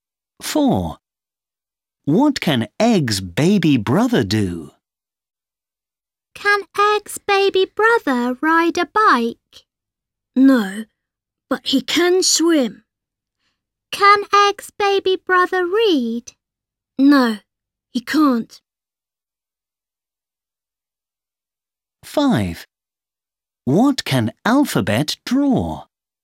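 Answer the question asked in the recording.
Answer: Swim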